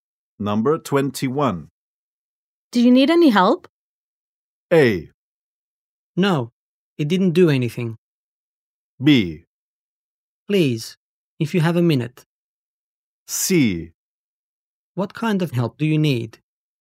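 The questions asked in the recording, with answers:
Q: Do you need any help?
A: B: Please, if you have a minute.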